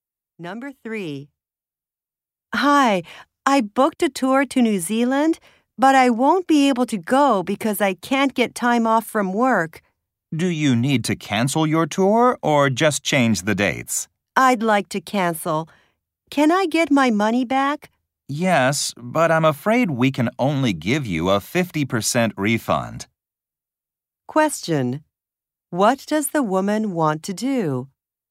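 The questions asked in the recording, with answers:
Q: What does the woman want to do?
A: Cancel her tour and get her money back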